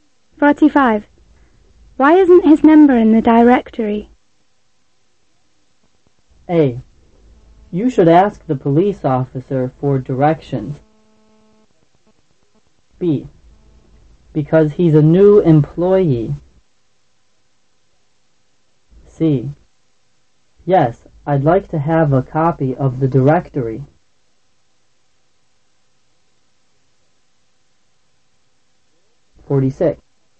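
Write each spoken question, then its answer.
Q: Why isn't his number in the directory?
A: B: Because he's a new employee.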